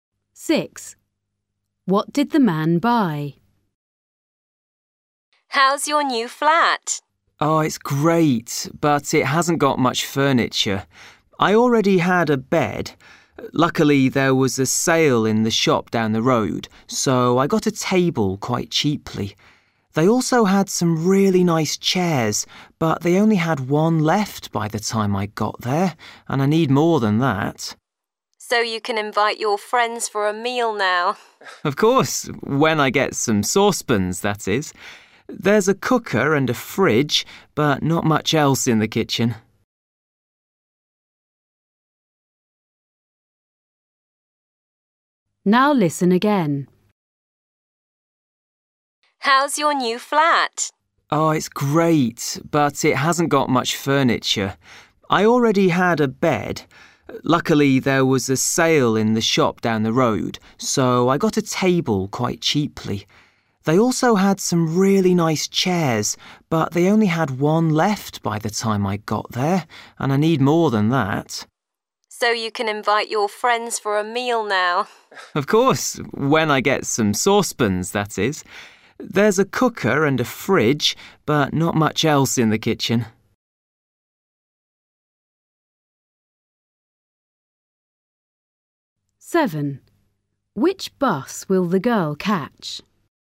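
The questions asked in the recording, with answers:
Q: What did the man buy?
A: a table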